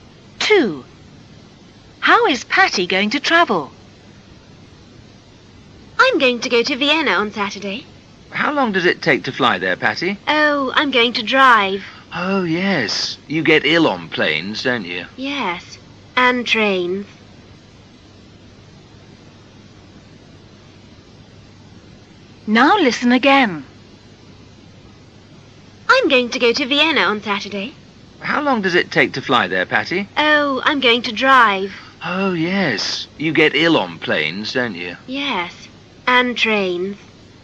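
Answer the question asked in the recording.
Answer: By car (she's going to drive)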